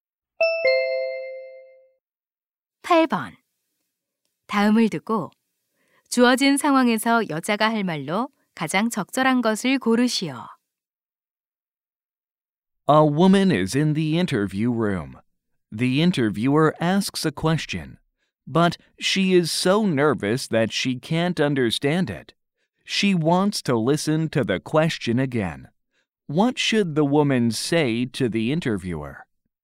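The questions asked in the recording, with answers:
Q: 다음을 듣고 주어진 상황에서 여자가 할 말로 가장 적절한 것을 고르시오.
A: 질문을 다시 말씀해 주시겠어요?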